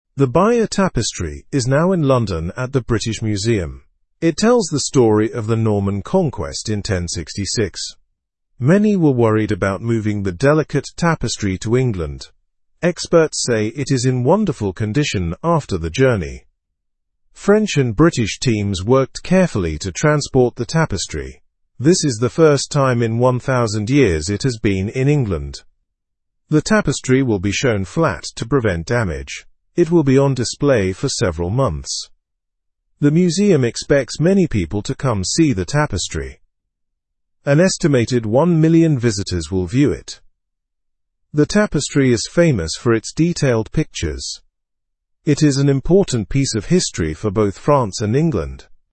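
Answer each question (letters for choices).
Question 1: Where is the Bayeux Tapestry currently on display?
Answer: The tapestry is at the British Museum in London.

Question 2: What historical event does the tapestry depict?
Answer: The tapestry depicts the Norman Conquest of

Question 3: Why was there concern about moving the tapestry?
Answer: People were worried it could be damaged because it is delicate.

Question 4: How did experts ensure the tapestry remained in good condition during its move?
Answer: They worked carefully and took precautions.

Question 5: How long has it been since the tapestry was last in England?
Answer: It has been 1,000 years.

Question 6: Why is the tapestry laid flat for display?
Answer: It is laid flat to prevent any damage from hanging.

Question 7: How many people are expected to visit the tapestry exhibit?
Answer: One million visitors are expected.

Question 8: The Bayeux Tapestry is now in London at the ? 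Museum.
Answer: British

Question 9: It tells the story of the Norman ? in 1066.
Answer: conquest

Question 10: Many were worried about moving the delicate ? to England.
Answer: tapestry

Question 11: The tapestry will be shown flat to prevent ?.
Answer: damage

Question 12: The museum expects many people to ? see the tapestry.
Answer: come

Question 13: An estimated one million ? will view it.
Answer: visitors

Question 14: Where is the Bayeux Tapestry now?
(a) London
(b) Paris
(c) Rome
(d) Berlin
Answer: a

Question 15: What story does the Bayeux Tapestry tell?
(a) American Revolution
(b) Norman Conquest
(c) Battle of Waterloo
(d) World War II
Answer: b

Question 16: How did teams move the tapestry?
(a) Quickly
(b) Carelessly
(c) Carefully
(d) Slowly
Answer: c

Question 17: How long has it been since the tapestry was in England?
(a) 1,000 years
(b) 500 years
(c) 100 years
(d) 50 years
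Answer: a

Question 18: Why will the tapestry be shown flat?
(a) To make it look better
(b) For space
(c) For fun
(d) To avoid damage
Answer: d

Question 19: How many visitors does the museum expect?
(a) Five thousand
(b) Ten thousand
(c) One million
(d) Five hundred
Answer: c

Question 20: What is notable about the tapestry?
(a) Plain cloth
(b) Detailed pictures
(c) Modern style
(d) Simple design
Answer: b

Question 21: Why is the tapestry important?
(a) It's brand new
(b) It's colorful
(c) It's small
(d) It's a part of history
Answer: d

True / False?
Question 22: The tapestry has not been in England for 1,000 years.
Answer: True

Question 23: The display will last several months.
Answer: True

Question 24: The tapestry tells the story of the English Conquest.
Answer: False

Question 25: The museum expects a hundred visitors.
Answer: False

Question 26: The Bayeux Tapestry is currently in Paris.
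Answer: False

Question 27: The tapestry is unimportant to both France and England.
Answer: False

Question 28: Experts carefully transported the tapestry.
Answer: True

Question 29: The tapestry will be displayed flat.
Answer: True

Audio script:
The Bayeux Tapestry is now in London at the British Museum. It tells the story of the Norman Conquest in 1066. Many were worried about moving the delicate tapestry to England. Experts say it is in wonderful condition after the journey.
French and British teams worked carefully to transport the tapestry. This is the first time in 1,000 years it has been in England. The tapestry will be shown flat to prevent damage. It will be on display for several months.
The museum expects many people to come see the tapestry. An estimated one million visitors will view it. The tapestry is famous for its detailed pictures. It is an important piece of history for both France and England.

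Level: Level 2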